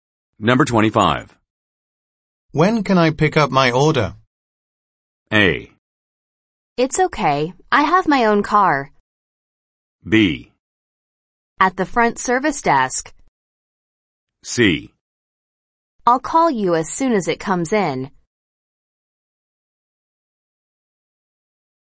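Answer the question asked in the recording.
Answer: C: I'll call you as soon as it comes in.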